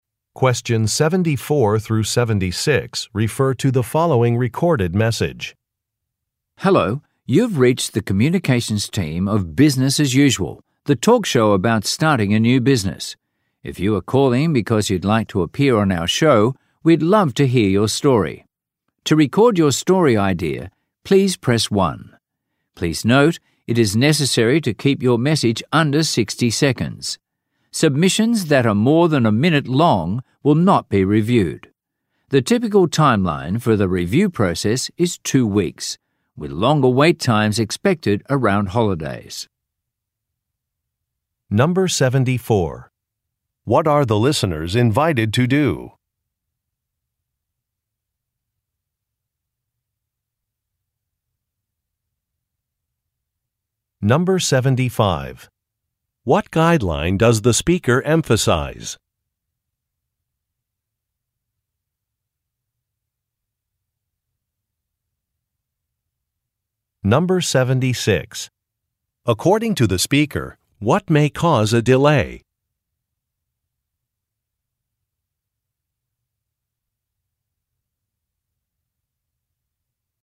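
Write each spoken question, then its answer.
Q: What are the listeners invited to do?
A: Share a story idea to appear on the show

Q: What guideline does the speaker emphasize?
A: Keep the message under 60 seconds

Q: According to the speaker, what may cause a delay?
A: Holidays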